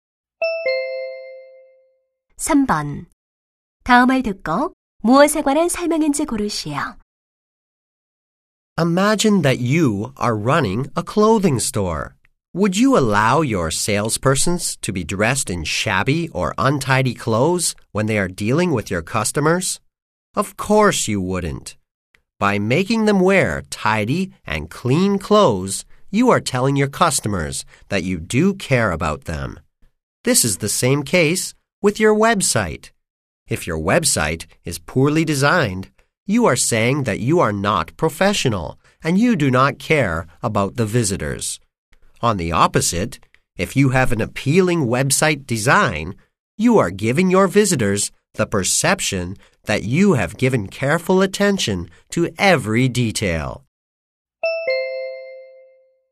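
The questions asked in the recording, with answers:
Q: 다음을 듣고 무엇에 관한 설명인지 고르시오.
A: 웹사이트 디자인의 중요성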